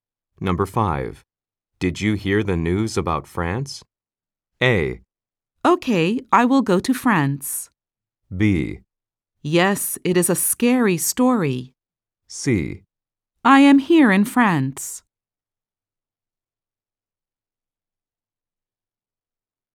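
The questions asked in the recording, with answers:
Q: Did you hear the news about France?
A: B: Yes, it is a scary story.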